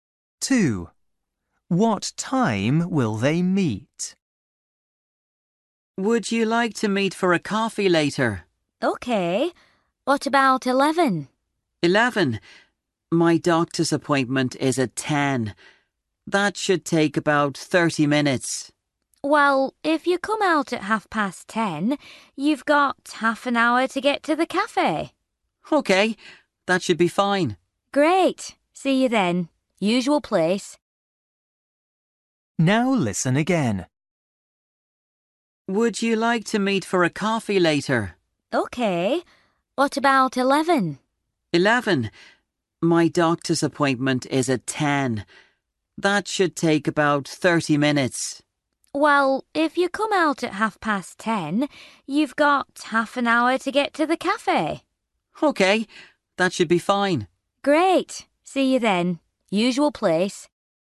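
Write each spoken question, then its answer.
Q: What time will they meet?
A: 11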